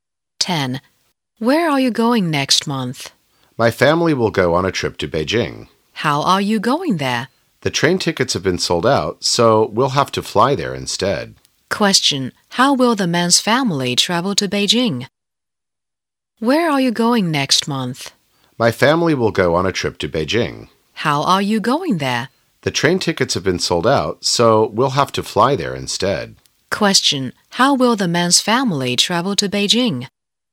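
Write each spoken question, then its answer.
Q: How will the man's family travel to Beijing?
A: By plane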